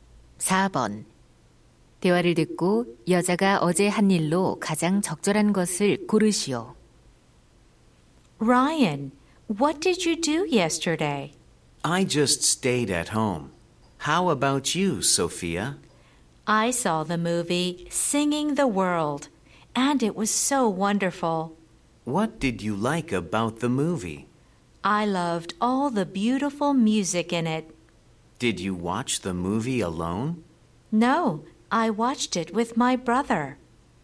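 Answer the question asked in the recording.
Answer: 영화 보기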